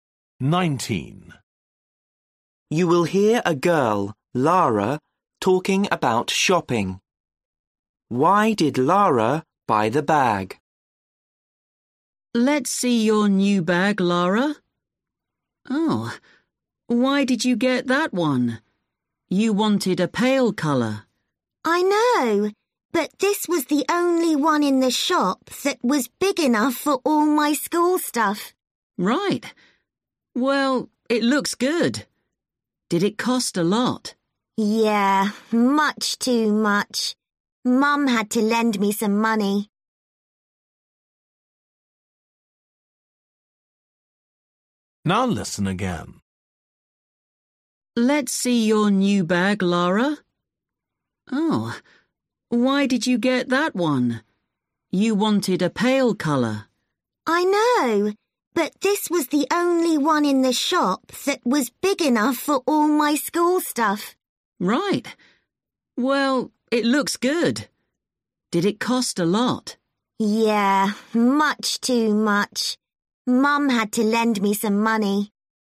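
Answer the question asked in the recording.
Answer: It was the only one big enough for her school things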